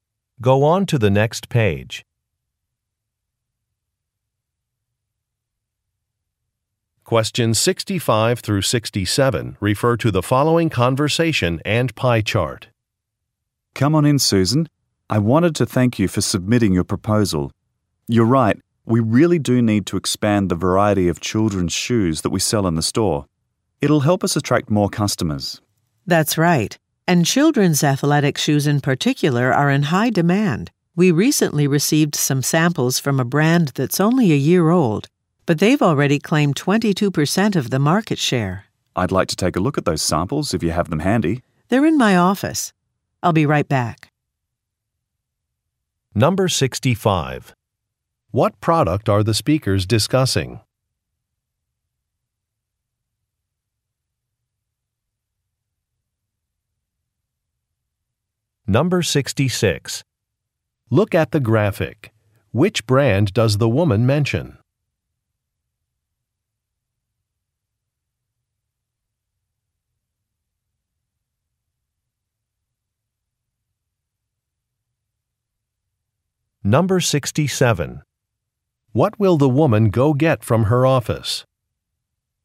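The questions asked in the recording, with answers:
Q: What product are the speakers discussing?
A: Children's shoes

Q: What will the woman go get from her office?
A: Samples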